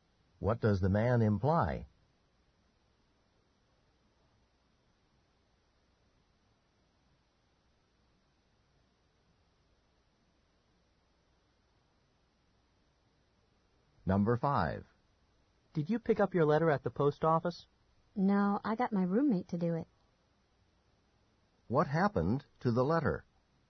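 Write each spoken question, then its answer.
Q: What happened to the letter?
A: The roommate picked it up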